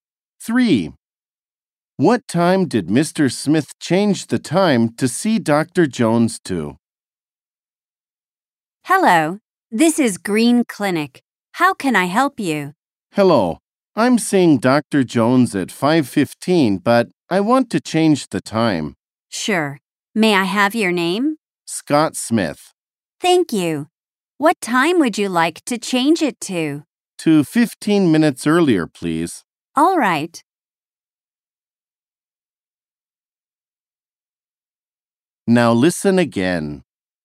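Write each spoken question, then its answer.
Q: What time did Mr. Smith change the time to see Dr. Jones to?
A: 5:00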